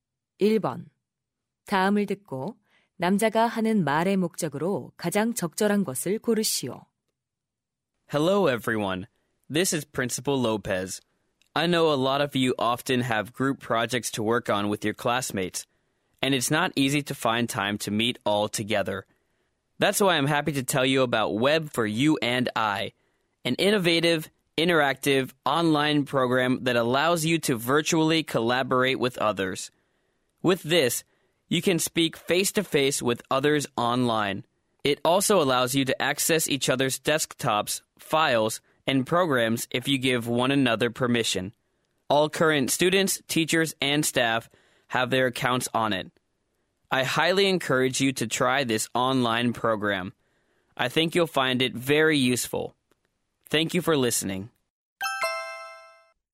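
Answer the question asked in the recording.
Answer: 온라인 협업 프로그램 사용을 권장하려고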